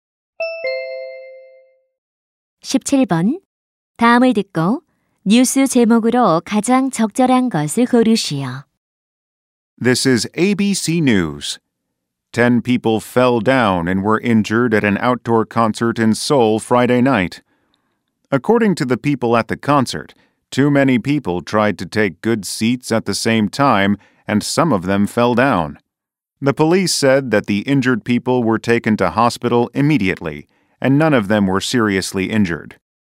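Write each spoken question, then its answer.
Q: 다음을 듣고 뉴스 제목으로 가장 적절한 것을 고르시오.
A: 서울 야외 콘서트에서 10명 부상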